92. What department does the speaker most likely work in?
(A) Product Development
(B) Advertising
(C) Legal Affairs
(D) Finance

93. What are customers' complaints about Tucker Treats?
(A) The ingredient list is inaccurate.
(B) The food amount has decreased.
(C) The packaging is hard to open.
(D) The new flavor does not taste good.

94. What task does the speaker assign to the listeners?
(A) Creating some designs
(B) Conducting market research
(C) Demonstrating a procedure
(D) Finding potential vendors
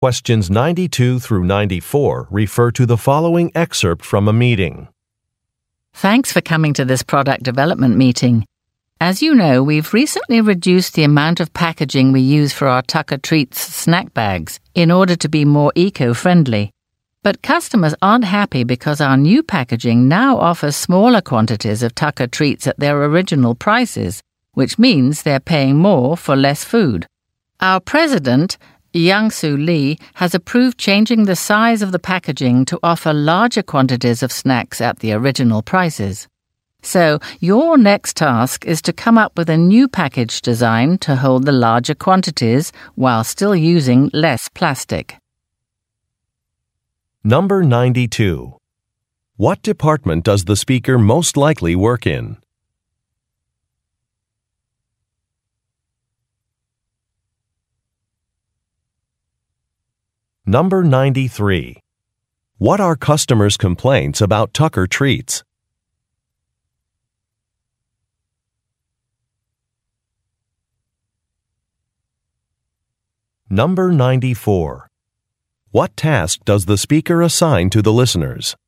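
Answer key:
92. A
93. B
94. A

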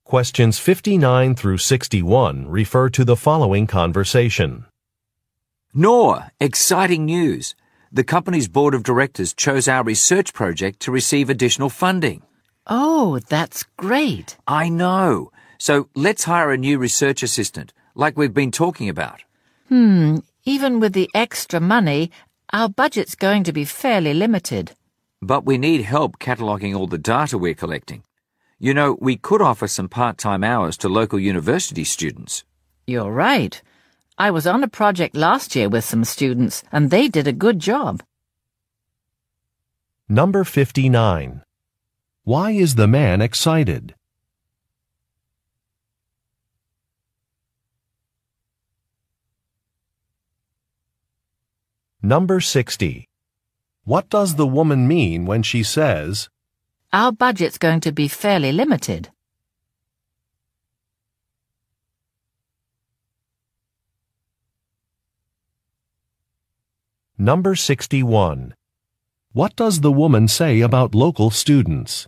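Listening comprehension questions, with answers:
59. Why is the man excited?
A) He has been promoted.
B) His vacation request was approved.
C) A research article will be published.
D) A project will receive extra funding.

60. What does the woman mean when she says. "our budget's going to be fairly limited"?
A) The company's decision is not surprising.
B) A fund-raiser should be organized.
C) Some numbers need to be checked.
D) The man's suggestion may not work.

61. What does the woman say about local students?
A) She has worked with them before.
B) She is tutoring them in science.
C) They are participating in a conference.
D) They have made several donations.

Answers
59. D
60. D
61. A

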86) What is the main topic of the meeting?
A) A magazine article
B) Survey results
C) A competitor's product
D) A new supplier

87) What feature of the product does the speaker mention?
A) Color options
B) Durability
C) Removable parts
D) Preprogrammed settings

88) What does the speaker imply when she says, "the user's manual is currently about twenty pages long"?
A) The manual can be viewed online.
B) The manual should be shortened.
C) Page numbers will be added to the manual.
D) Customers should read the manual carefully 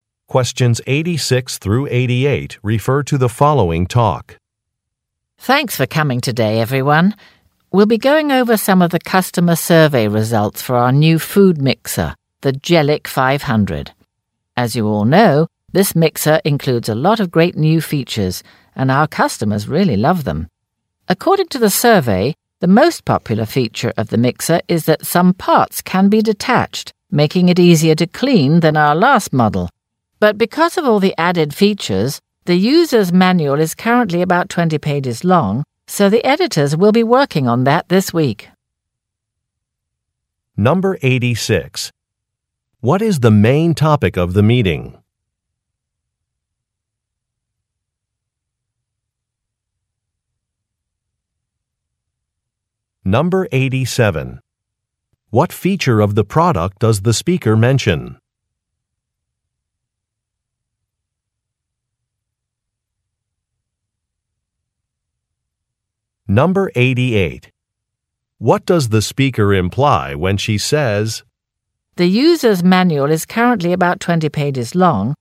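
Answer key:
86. B
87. C
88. B

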